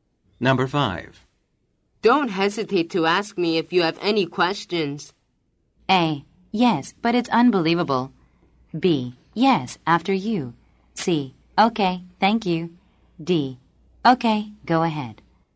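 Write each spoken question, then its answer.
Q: Don't hesitate to ask me if you have any questions.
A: C: Okay, thank you.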